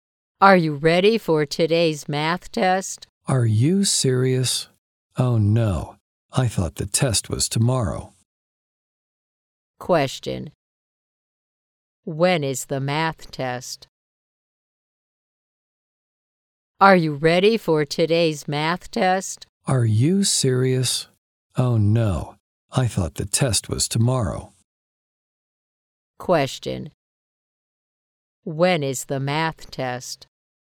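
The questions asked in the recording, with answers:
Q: When is the math test?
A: Today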